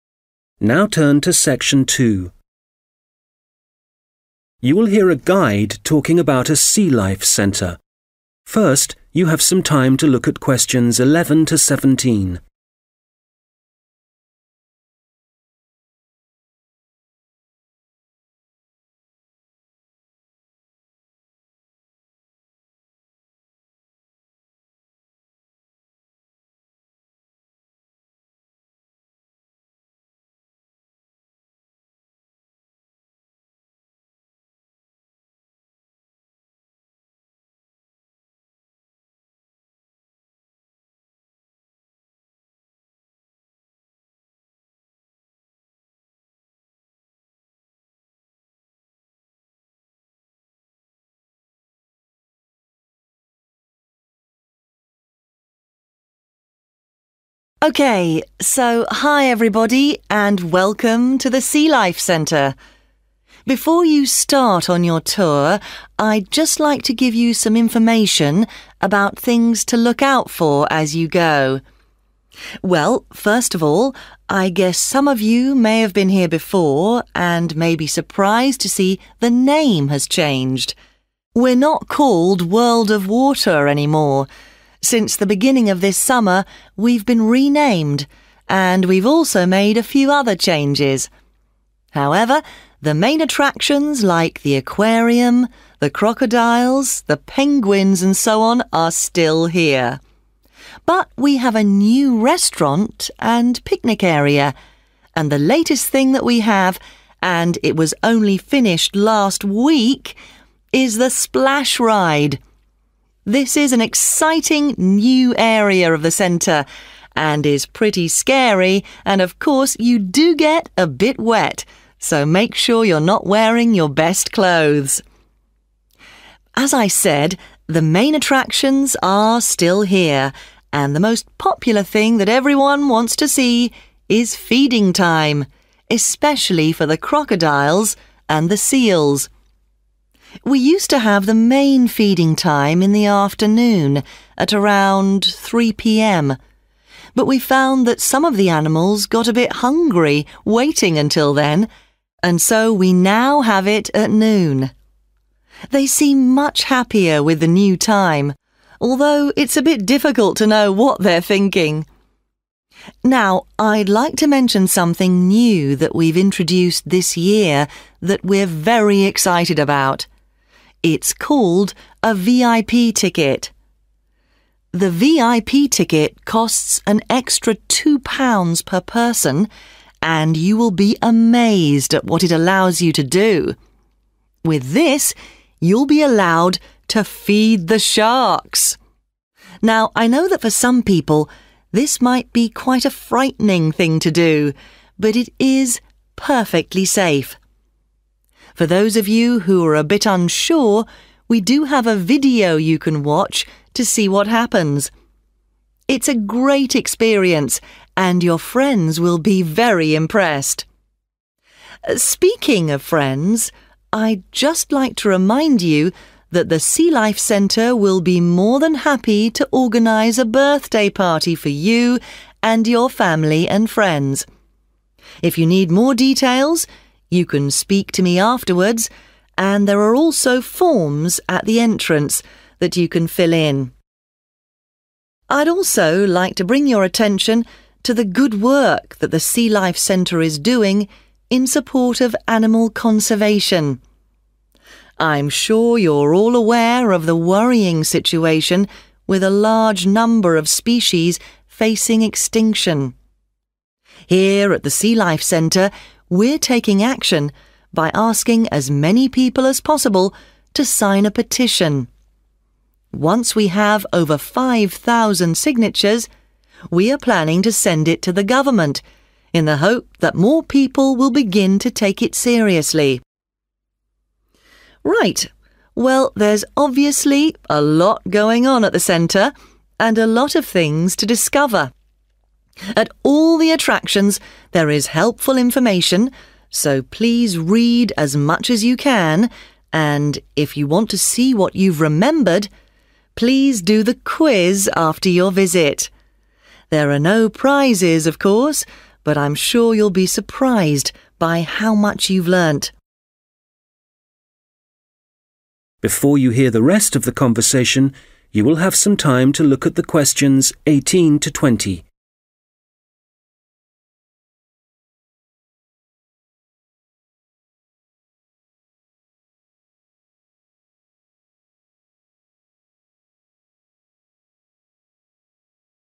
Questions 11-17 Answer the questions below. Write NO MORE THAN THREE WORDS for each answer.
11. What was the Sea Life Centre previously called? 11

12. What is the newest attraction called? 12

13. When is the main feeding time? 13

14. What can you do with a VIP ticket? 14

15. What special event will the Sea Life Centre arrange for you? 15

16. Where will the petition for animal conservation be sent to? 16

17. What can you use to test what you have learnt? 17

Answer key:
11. world of water
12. splash ride
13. noon
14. feed sharks
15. birthday party
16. government
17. quiz

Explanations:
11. I guess some of you may have been here before and may be surprised to see the name has changed. We're not called World of Water anymore [Tôi đoán một số bạn có thể đã từng đến đây và có lẽ đang ngạc nhiên khi thấy tên đã thay đổi. Tên của chúng tôi không còn là World of Water nữa].
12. And the latest (newest) thing that we have on it was only finished last week is (the) splash ride [Và thứ mới nhất mà chúng tôi có, vừa mới được hoàn thành vào tuần trước, là trò chơi té nước].
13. We used to have the main feeding time in the afternoon at around 3 pm but we found that some of the animals got a bit hungry waiting until then and so we now have it at noon [Thường thì thời gian cho ăn chính của buổi chiều là vào khoảng 3 giờ nhưng chúng tôi thấy rằng một số động vật hơi đói khi chờ đến lúc đó và vì vậy bây giờ chúng tôi đã cho ăn vào buổi trưa].
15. Speaking of friends, I just like to remind you that the Sea Life Centre will be more than happy to organize (= arrange) (a) birthday party for you and your family and friends [Nói về bạn bè, tôi chỉ muốn nhắc bạn rằng Sea Life Centre sẽ rất vui khi được tổ chức sinh nhật cho bạn, gia đình và bạn bè của bạn].
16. Here at the Sea Life Centre, we're taking action by asking as many people as possible to sign a petition. Once we have over 5000 signatures, we're planning to send it to (the) government [Tại Sea Life Centre, chúng tôi hành động bằng cách kêu gọi càng nhiều người ký tên vào đơn thỉnh cầu càng tốt. Một khi có được hơn 5000 chữ ký, chúng tôi sẽ gửi nó cho chính phủ]
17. And if you want to see what you've remembered (= test what you have learnt), please do (the) quiz after your visit [Và nếu bạn muốn kiểm tra xem mình đã nhớ được những gì, vui lòng làm bài test này sau chuyến thăm của bạn].

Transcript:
Okay, so hi, everybody and welcome to the Sea Life Centre. Before you start on your tour, I just like to give you some information about things to look out for as you go. Well, first of all, (Q11) I guess some of you may have been here before and may be surprised to see the name has changed. Since the beginning of this summer, we've been renamed and we've also made a few other changes. However, the main attractions like the aquarium, the crocodiles, the penguins and so on are still here. But we have a new restaurant and picnic area. This is an exciting new area of the center and is pretty scary and of course, you do get a bit wet, so make sure you're not wearing your best clothes.
As I said, the main attractions are still here and the most popular thing. That everyone wants to see is feeding time, especially for the crocodiles and the seals. They see much happier with the new time, although it's a bit difficult to know what they're thinking.
Now, I'd like to mention something new that we've introduced this year that we're very excited about. It's called a VIP ticket. (Q14) The VIP ticket costs an extra £2 per person and you will be amazed at what it allows you to do. Now I know that for some people, this might be quite a frightening thing to do. But it is perfectly safe. For those of you who are a bit unsure, we do have a video you can watch to see what happens. It's a great experience, and your friends will be very impressed.
If you need more details, you can speak to me afterwards and there are also forms at the entrance that you can fill in.
I'd also like to bring your attention to the good work that the Sea Life Centre is doing in the support of animal conservation. I'm sure you're all aware of the worrying situation, with a large number of species facing extinction. (Q16) Here at the Sea Life Centre, we're taking action by asking as many people as possible to sign a petition.